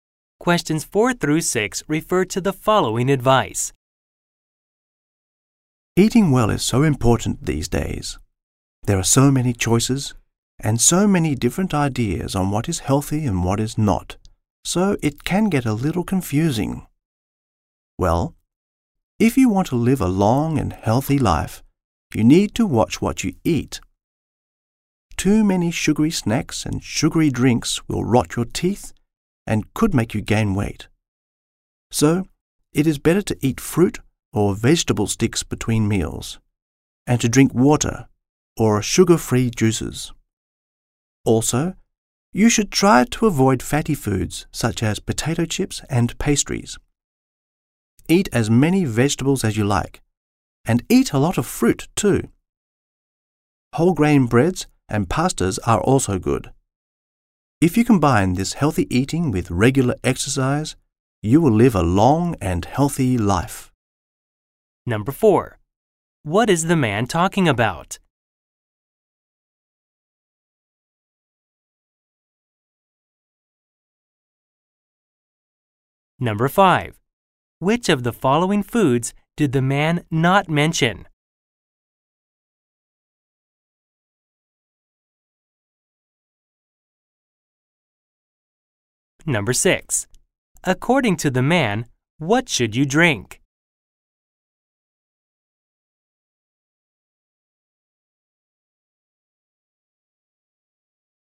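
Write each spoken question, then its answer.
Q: What is the man talking about?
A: Healthy eating

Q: According to the man, what should you drink?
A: Water or sugar-free juices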